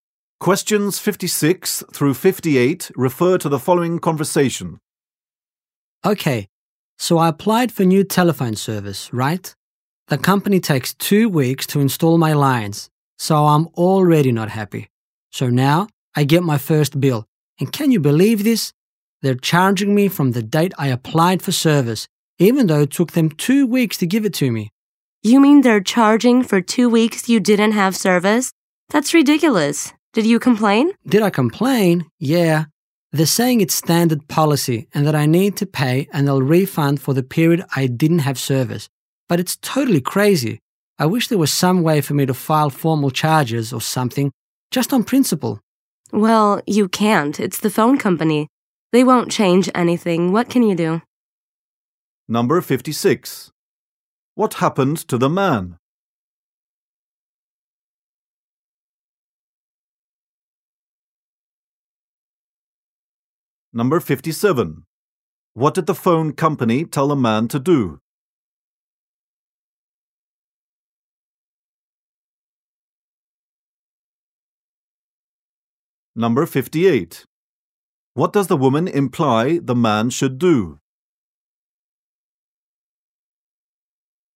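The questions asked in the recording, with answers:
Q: What happened to the man?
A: He was charged for two weeks without phone service

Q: What did the phone company tell the man to do?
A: Pay the bill and wait for a refund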